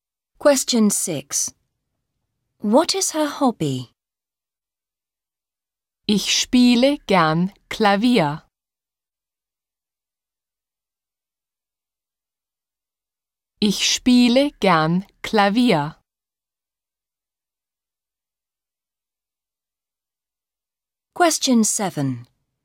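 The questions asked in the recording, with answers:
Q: What is her hobby?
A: Playing the piano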